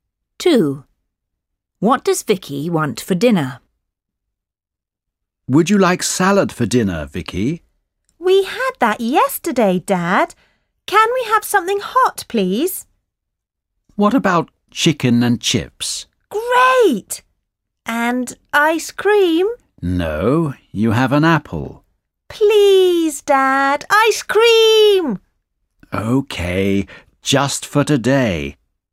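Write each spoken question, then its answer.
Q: What does Vicky want for dinner?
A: chicken and chips and ice cream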